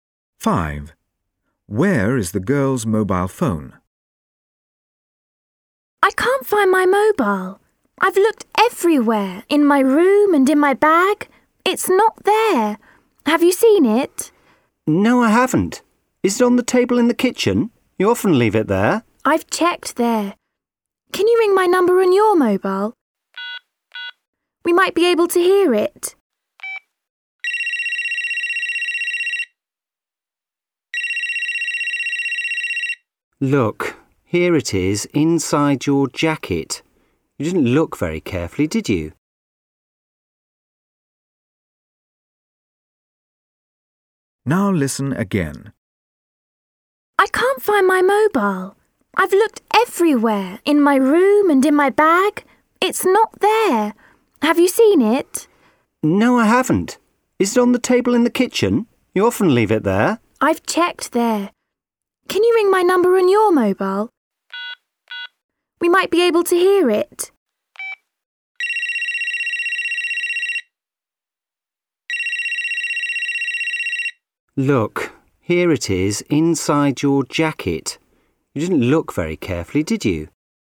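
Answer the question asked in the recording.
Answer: Inside her jacket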